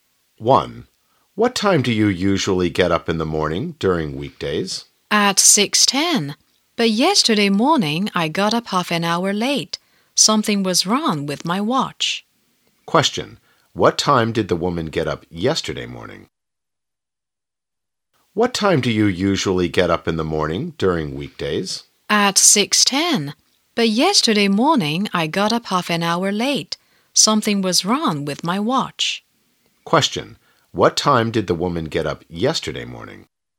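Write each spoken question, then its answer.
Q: What time did the woman get up yesterday morning?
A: At 6:40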